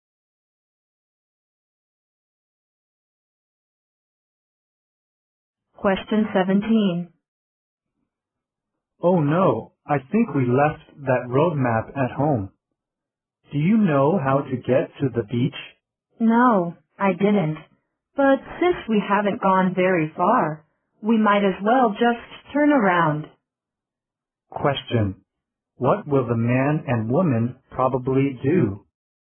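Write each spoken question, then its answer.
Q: What will the man and woman probably do?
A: Go back home to get the map.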